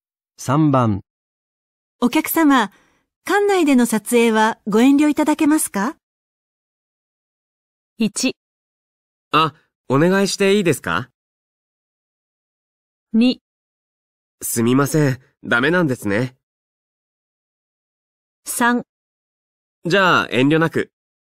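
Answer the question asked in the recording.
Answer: 2: すみません、ダメなんですね。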